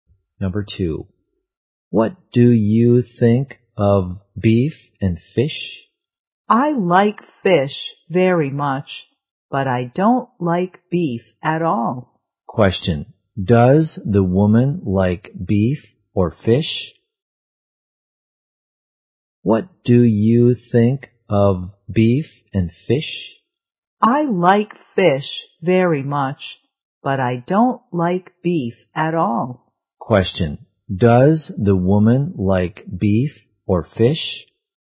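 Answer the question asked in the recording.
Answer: Fish.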